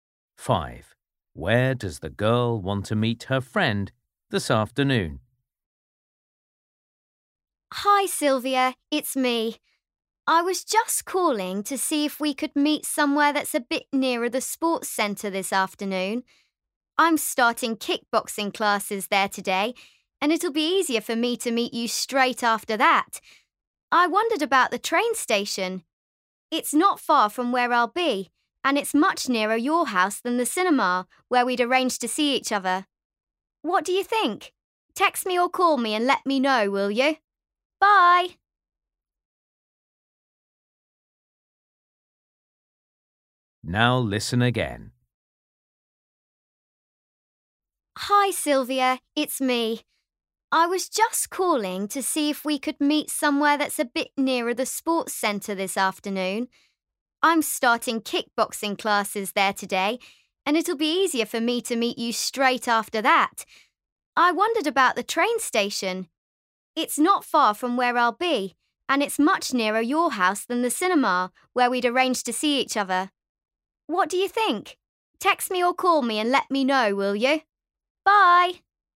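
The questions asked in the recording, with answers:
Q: Where does the girl want to meet her friend this afternoon?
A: the train station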